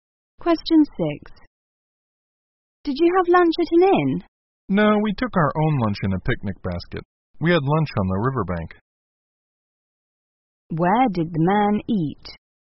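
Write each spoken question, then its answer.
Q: Where did the man eat?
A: On the riverbank.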